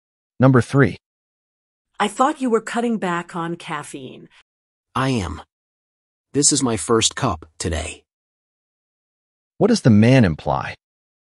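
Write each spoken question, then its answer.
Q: What does the man imply?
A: He is still cutting back; he has had only one cup today.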